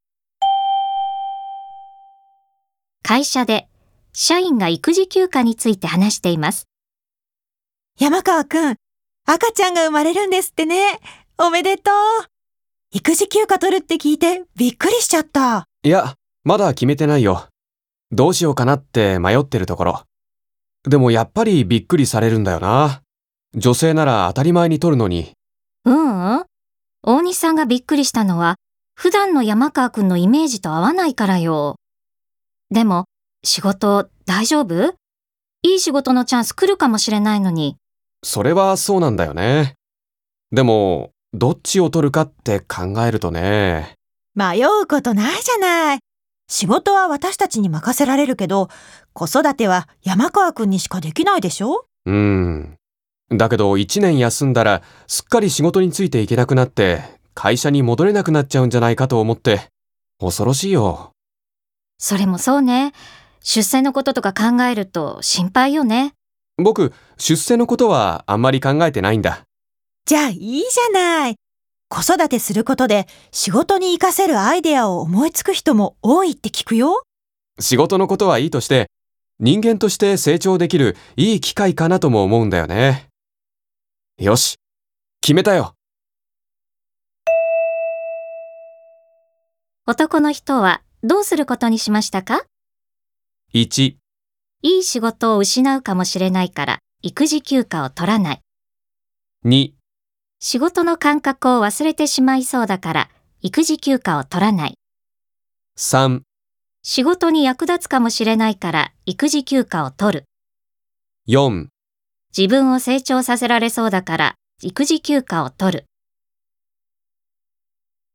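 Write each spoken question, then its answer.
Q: 男の人はどうすることにしましたか?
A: 4: 自分を成長させられそうだから育児休暇を取る。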